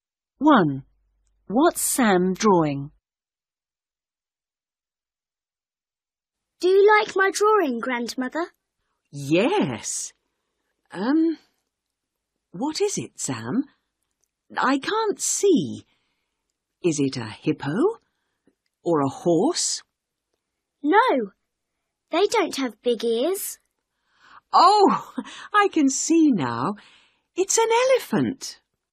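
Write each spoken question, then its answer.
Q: What's Sam drawing?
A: An elephant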